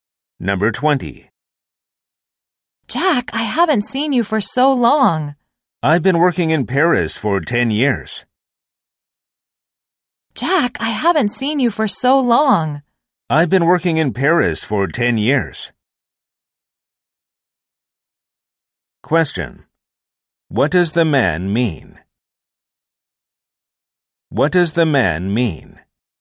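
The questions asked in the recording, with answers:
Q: What does the man mean?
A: He has been working in Paris for 10 years.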